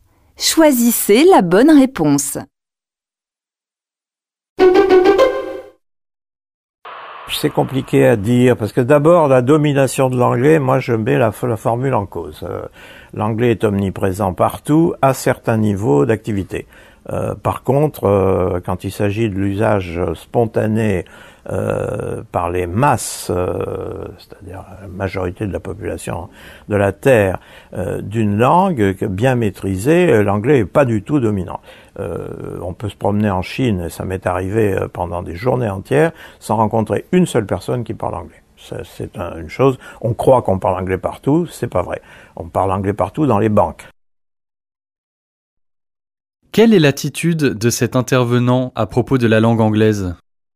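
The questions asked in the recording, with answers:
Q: Quelle est l'attitude de cet intervenant à propos de la langue anglaise ?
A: Il relativise la domination de l'anglais : omniprésent dans certains domaines, mais pas parlé spontanément par la majorité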